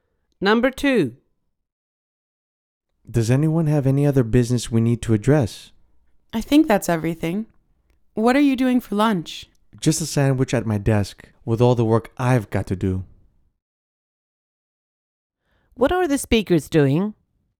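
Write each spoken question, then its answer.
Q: What are the speakers doing?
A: Finishing a meeting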